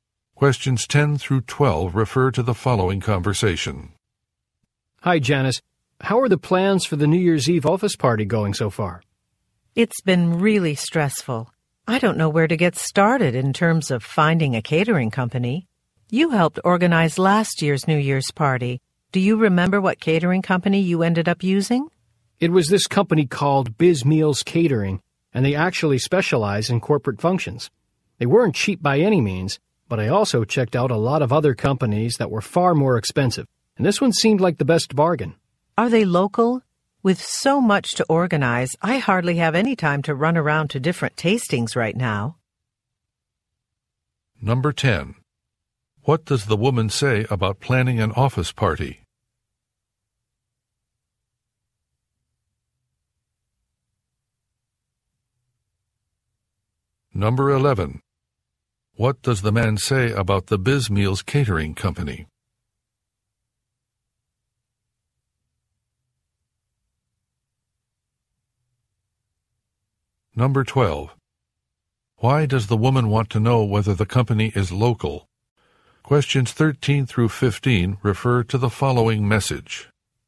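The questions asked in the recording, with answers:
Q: What does the woman say about planning an office party?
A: It's been really stressful

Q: What does the man say about the Biz Meals Catering Company?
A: It specializes in corporate functions and was the best bargain

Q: Why does the woman want to know whether the company is local?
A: She has little time to go to tastings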